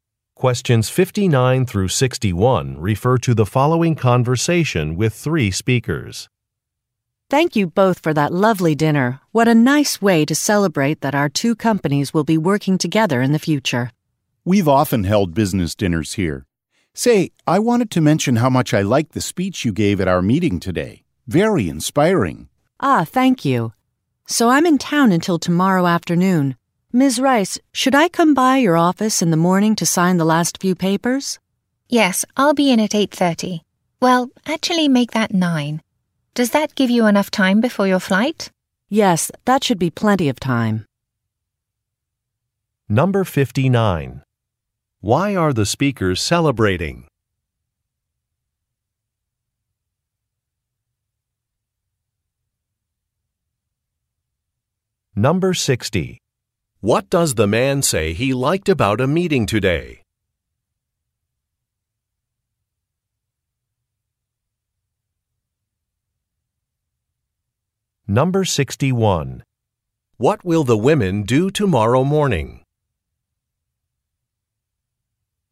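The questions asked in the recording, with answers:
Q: Why are the speakers celebrating?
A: Their companies will work together

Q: What does the man say he liked about a meeting today?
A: The speech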